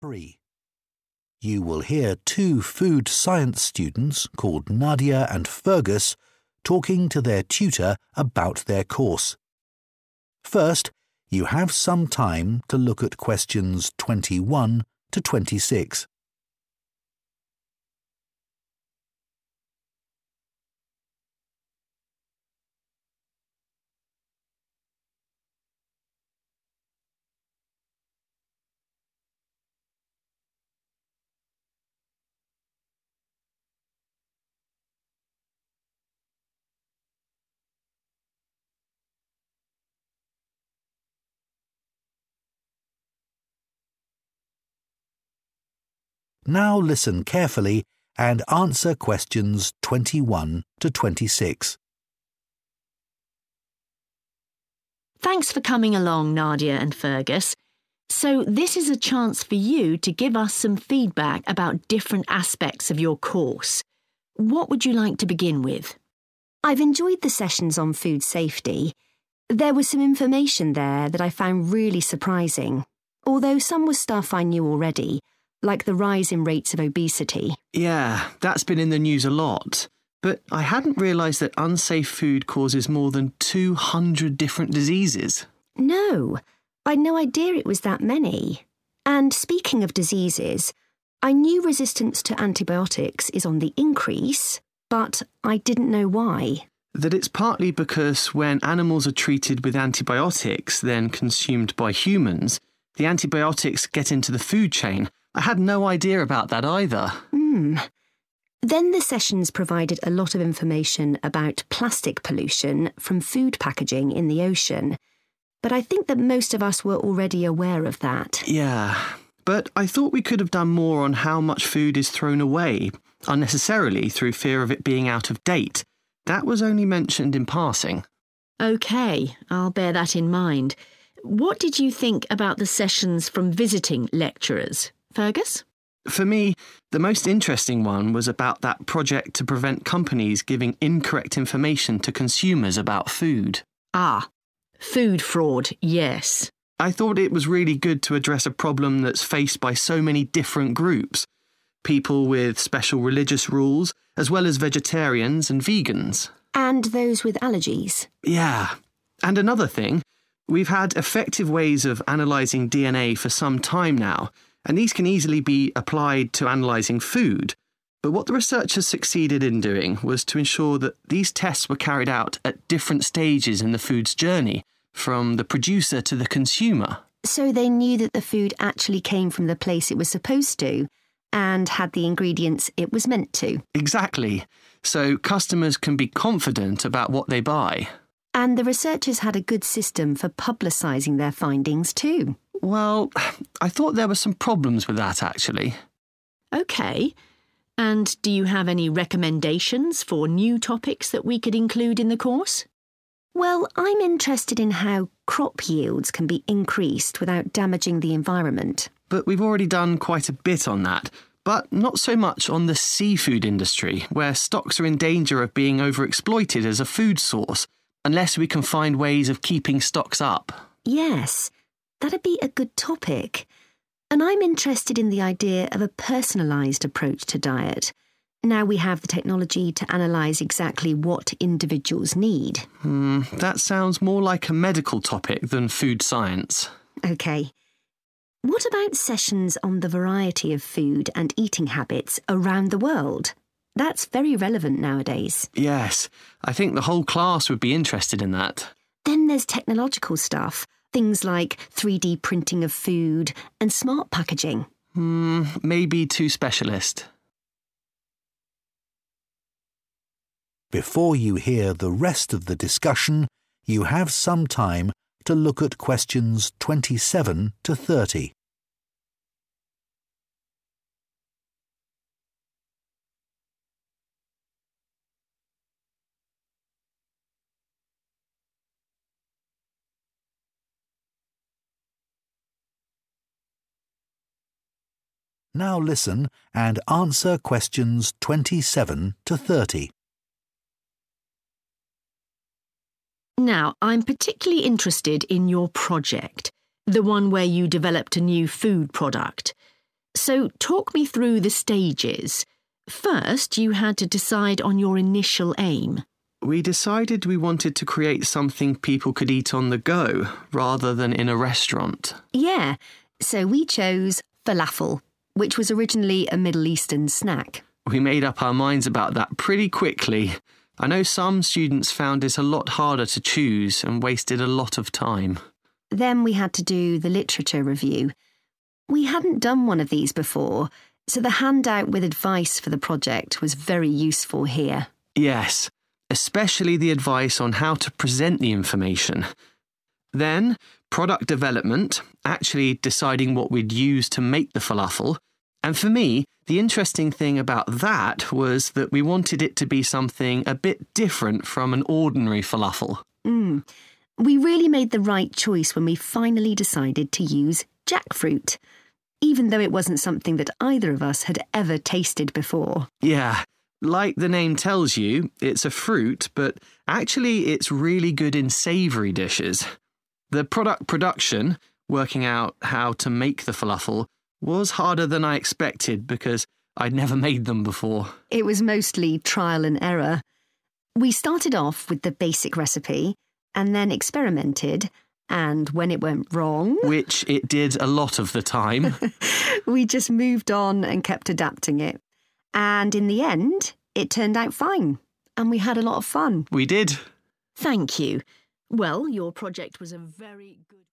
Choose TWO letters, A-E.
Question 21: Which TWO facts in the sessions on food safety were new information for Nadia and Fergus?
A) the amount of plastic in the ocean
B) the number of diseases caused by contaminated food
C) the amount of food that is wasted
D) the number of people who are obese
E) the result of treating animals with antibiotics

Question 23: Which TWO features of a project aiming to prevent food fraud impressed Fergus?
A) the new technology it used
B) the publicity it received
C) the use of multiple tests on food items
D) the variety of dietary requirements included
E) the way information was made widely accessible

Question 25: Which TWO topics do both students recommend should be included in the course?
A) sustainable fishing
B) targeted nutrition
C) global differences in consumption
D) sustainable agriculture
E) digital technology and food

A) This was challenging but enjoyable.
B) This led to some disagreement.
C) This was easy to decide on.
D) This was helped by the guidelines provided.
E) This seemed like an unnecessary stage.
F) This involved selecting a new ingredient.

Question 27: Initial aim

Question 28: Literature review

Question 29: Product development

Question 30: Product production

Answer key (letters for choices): 21B, 23C, 25A, 27C, 28D, 29F, 30A

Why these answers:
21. The correct answer is B and E because both students say they did not know these facts before the course. Fergus mentions he was surprised that bad food causes over 200 types of sicknesses (diseases), and Nadia says she did not know the number was that high. Next, Nadia explains she did not know 'why' medicine resistance was growing. Fergus explains it is because medicines (antibiotics) for animals enter the human food chain when people eat those animals, and he says he had no idea about that either. They were already aware of other facts like obesity and plastic in the ocean, so those are not the new information.
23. The correct answer is derived from Fergus's positive comments regarding a project about food fraud. First, he mentions that the project was good because it helped many different groups of people, such as those with religious rules or people who do not eat meat (vegetarians and vegans). This corresponds to dietary requirements. Second, he highlights that researchers were successful in performing tests at various points in time as a product travels from the maker to the customer, meaning multiple checks or tests were performed along the way.
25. The correct answer identifies the only two topics that both Nadia and Fergus liked and agreed to include. First, Fergus mentions that the seafood industry needs to find ways to keep fish stocks up so we don't run out, and Nadia responds that it would be a good topic. Second, Nadia suggests learning about the variety of food and eating habits in different countries, and Fergus agrees that the whole class would be interested. Other topics, like technology or individual diets, were not agreed upon by both students.
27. The correct answer is C because Fergus mentions that they decided on their goal 'pretty quickly.' He contrasts their experience with other students who found this part 'a lot harder' and 'wasted a lot of time.' This indicates that for Nadia and Fergus, the process of picking an initial aim was simple and fast, which matches the description 'easy to decide on.'
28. The correct answer is D because Nadia mentions that they were given a 'handout with advice' to help with the project. She says this handout was 'very useful' because they had never done a literature review before. This matches the idea of being 'helped by the guidelines provided.' Fergus agrees, specifically mentioning that the tips on how to show their findings were especially helpful.
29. The correct answer is F because Fergus and Nadia discuss the 'product development' stage of their project. Fergus explains that this stage was about 'deciding what we'd use' for their falafel. Nadia then notes that they chose to use 'jackfruit', which was an ingredient that neither of them had ever tasted before, making it a new ingredient.
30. The correct answer is identified by looking at how Fergus and Nadia describe the process of making their food product. Fergus uses the word 'harder' to describe the work, which means it was challenging. Nadia then explains that they often made mistakes but 'had a lot of fun' while doing it, which means it was enjoyable. The combination of these two points matches the description of being challenging but enjoyable.

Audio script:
TUTOR: Thanks for coming along, Nadia and Fergus. So this is a chance for you to give us some feedback about different aspects of your course. What would you like to begin with?
NADIA: I've enjoyed the sessions on food safety. There was some information there that I found really surprising, although some was stuff I knew already, like the rise in rates of obesity.
FERGUS: Yeah, that's been in the news a lot. But I hadn't realised that unsafe food causes more than 200 different diseases.
NADIA: No, I'd no idea it was that many. And speaking of diseases, I knew resistance to antibiotics is on the increase, but I didn't know why ...
FERGUS: ...that it's partly because when animals are treated with antibiotics then consumed by humans, the antibiotics get into the food chain. I had no idea about that either.
NADIA: Then the sessions provided a lot of information about plastic pollution from food packaging in the ocean, but I think that most of us were already aware of that.
FERGUS: Yeah. But I thought we could have done more on how much food is thrown away unnecessarily through fear of it being out of date, that was only mentioned in passing.
TUTOR: OK, I'll bear that in mind. What did you think about the sessions from visiting lecturers, Fergus?
FERGUS: For me the most interesting one was about that project to prevent companies giving incorrect information to consumers about food.
TUTOR: Ah, food fraud, yes.
FERGUS: I thought it was really good to address a problem that's faced by so many different groups - people with special religious rules, as well as vegetarians and vegans.
NADIA: And those with allergies.
FERGUS: Yeah. And another thing, we've had effective ways of analysing DNA for some time now and these can easily be applied to analysing food. But what the researchers succeeded in doing was to ensure that these tests were carried out at different stages in the food's journey from the producer to the consumer. So they knew that the food actually came from the place it was supposed to, and had the ingredients it was meant to.
NADIA: Exactly. So customers can be confident about what they buy.
FERGUS: And the researchers had a good system for publicising their findings too.
NADIA: Well, I thought there were some problems with that, actually.
TUTOR: OK. And do you have any recommendations for new topics that we could include in the course?
NADIA: Well, I'm interested in how crop yields can be increased without damaging the environment.
FERGUS: But we've already done quite a bit on that - but not so much on the seafood industry, where stocks are in danger of being overexploited as a food source unless we can find ways of keeping stocks up.
NADIA: Yes, that'd be a good topic. And I'm interested in the idea of a personalised approach to diet, now we have the technology to analyse exactly what individuals need.
FERGUS: That sounds more like a medical topic than food science.
NADIA: OK. What about sessions on the variety of food and eating habits around the world? That's very relevant nowadays.
FERGUS: Yes, I think the whole class would be interested in that.
NADIA: Then there's technological stuff, things like 3D printing of food and smart packaging.
FERGUS: Mmm - maybe too specialist.
TUTOR: Now, I'm particularly interested in your project - the one where you developed a new food product. So talk me through the stages... first you had to decide on your initial aim.
FERGUS: We decided we wanted to create something people could eat on the go rather than in a restaurant.
NADIA: Yeah so we chose falafel, which was originally a Middle Eastern snack.
FERGUS: We made up our minds about that pretty quickly. I know some students found it a lot harder to choose, and wasted a lot of time.
NADIA: Then we had to do the literature review. We hadn't done one of these before so, the handout with advice for the project was very useful here.
FERGUS: Yes, especially the advice on how to present the information. Then product development, actually deciding what we'd use to make the falafel, and for me the interesting thing about that was that we wanted it to be something a bit different from an ordinary falafel.
NADIA: We really made the right choice when we finally decided to use jackfruit, even though it wasn't something that either of us had ever tasted before.
FERGUS: Yeah, like the name tells you, it's a fruit but actually it's really good in savoury dishes. The product production, working out how to make the falafel, was harder than I expected because I'd never made them before.
NADIA: It was mostly trial and error. We started off with the basic recipe and then experimented and when it went wrong...
FERGUS: ...which it did a lot of the time...
NADIA: ...we just moved on and kept adapting it and in the end it turned out fine and we had a lot of fun.
FERGUS: We did!
TUTOR: Thank you. Well, your project was a very good ....